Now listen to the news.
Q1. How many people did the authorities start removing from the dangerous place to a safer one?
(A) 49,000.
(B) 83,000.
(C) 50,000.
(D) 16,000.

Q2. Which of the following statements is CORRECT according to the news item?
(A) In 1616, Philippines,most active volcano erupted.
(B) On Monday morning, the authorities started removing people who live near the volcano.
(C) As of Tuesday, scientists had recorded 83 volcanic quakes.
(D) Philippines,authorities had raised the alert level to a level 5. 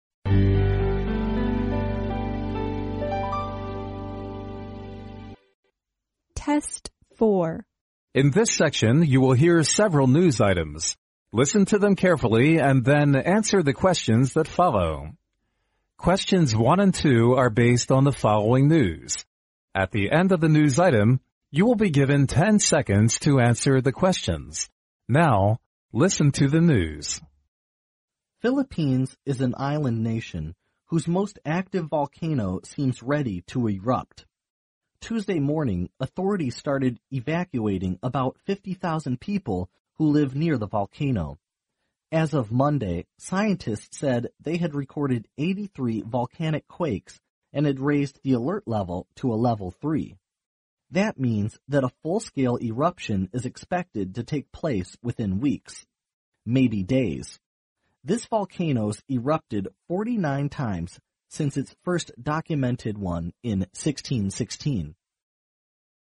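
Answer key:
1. C
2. A

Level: 英语四级

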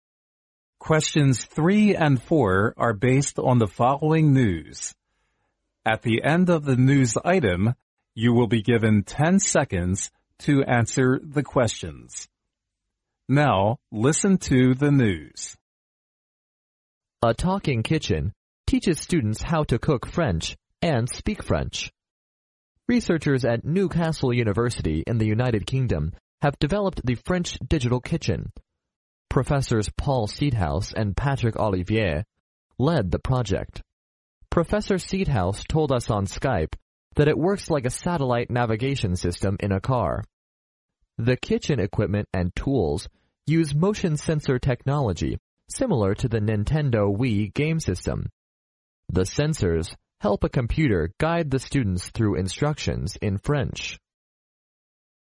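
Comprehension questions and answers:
Now listen to the news.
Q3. According to the news item, the "talking kitchen" can_____.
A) develop French digital projects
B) guide cars on roads through instructions in French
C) work with researchers on Skype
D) teach students how to cook French and speak French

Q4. Which of the following statements is INCORRECT?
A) Professors Patrick Olivier and Paul Seedhouse directed the project.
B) The "talking kitchen" is developed by the researchers in France.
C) The kitchen equipment and tools adopt motion sensor technology.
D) The "talking kitchen" works like a satellite navigation system in a car.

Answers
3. D
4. B

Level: 专业四级

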